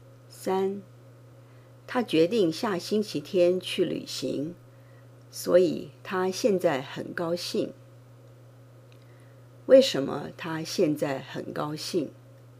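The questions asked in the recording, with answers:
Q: 为什么她现在很高兴?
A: 因为她决定下星期天去旅行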